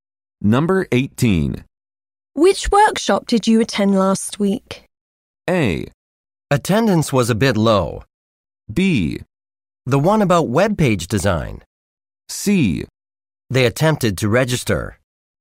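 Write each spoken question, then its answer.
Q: Which workshop did you attend last week?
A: B: The one about web page design.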